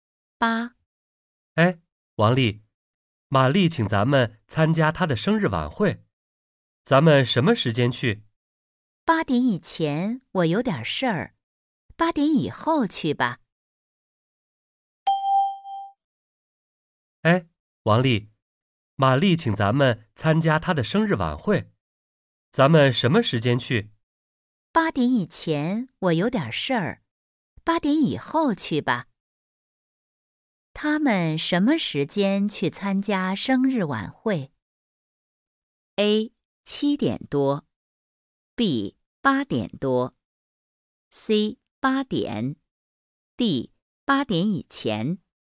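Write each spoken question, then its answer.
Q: 他们什么时间去参加生日晚会?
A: B: 8点多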